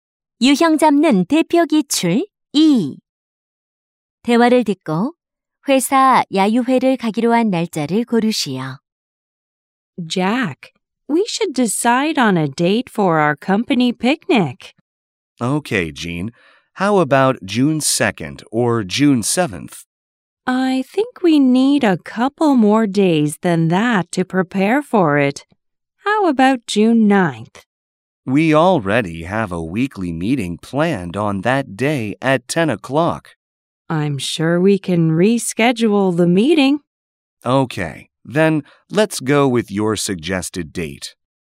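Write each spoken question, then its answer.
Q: 대화를 듣고 회사 야유회를 가기로 한 날짜를 고르시오.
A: 6월 9일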